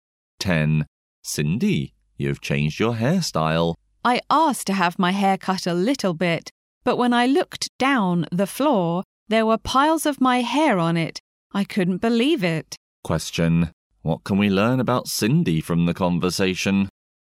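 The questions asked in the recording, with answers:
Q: What can we learn about Cindy from the conversation?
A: Her hair was cut much shorter than she wanted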